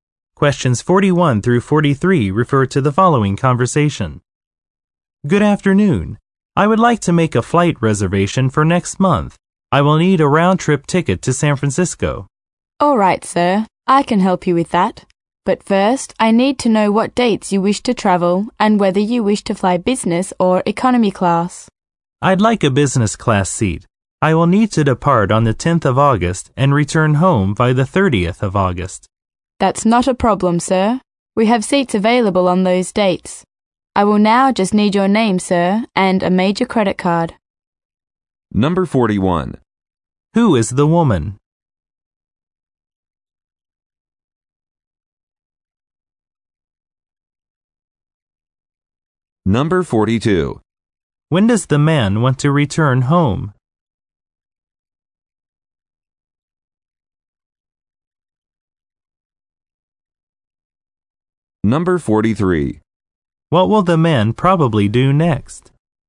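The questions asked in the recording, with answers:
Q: Who is the woman?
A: A travel/airline reservation agent

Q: When does the man want to return home?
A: By the 30th of August

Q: What will the man probably do next?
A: Give his name and a credit card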